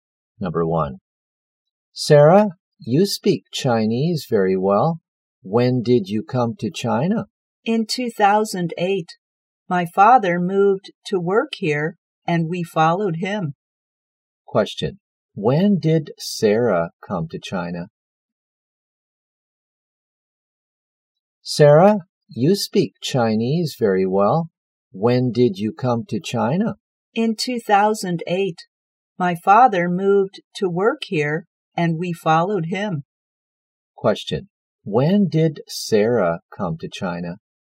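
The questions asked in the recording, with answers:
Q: When did Sarah come to China?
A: In 2008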